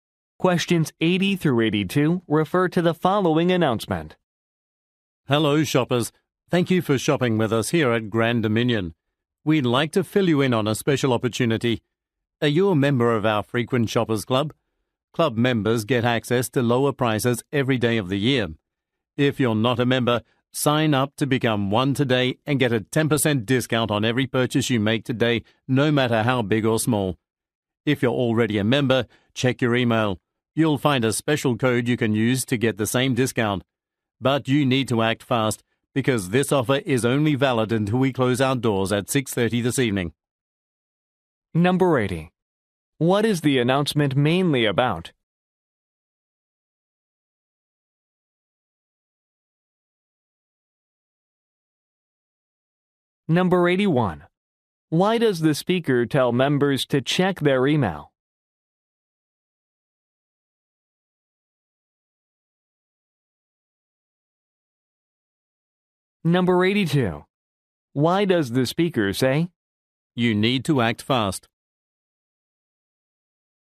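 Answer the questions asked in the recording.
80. A discount for Frequent Shoppers Club members
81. To get a discount code
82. The offer ends at closing time, 6:30 this evening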